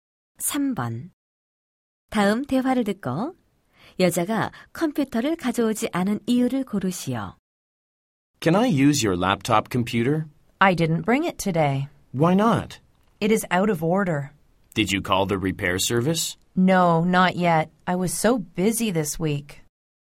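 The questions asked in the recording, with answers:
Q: 다음 대화를 듣고 여자가 컴퓨터를 가져오지 않은 이유를 고르시오.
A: 고장 나서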